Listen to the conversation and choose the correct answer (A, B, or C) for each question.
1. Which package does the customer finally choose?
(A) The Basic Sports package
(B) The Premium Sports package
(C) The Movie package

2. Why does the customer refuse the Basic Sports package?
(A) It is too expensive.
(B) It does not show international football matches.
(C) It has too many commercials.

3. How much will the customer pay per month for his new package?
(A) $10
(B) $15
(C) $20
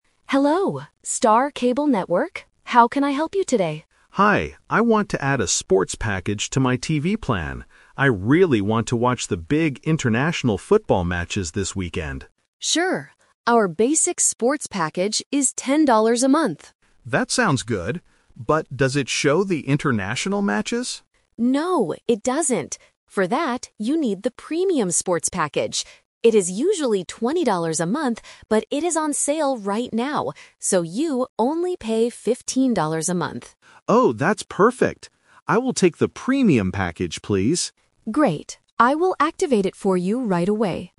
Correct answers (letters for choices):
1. B
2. B
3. B

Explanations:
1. The agent offers the "Basic Sports package" first (Option A is the trap). However, the customer needs to watch international matches, so he finally says, "I will take the Premium package, please." Option C is not mentioned.
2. The customer asks if the basic package shows international matches, and the agent says, "No, it doesn't." Option A is the trap (it is actually the cheaper option). Option C is not mentioned.
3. The audio has three numbers. $10 is for the basic package (Option A is the trap). $20 is the usual price for the premium package (Option C is the trap), "but" it is on sale, "so" the customer only pays $15.

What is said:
Agent: Hello, Star Cable Network. How can I help you today?
Customer: Hi, I want to add a sports package to my TV plan. I really want to watch the big international football matches this weekend.
Agent: Sure! Our Basic Sports package is $10 a month.
Customer: That sounds good. But does it show the international matches?
Agent: No, it doesn't. For that, you need the Premium Sports package. It is usually $20 a month, but it is on sale right now. So, you only pay $15 a month.
Customer: Oh, that's perfect! I will take the Premium package, please.